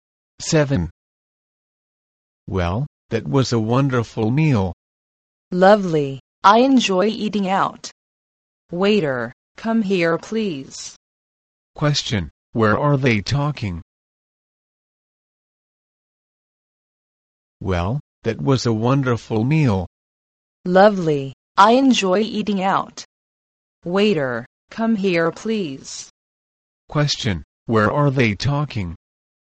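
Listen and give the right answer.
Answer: In a restaurant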